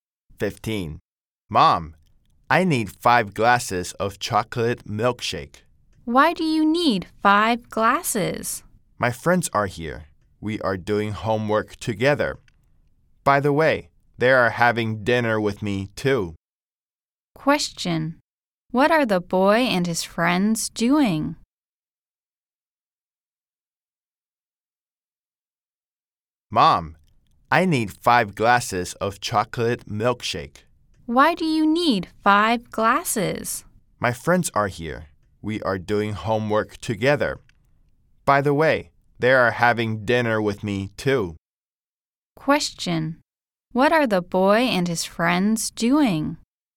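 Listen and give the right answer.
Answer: Doing homework together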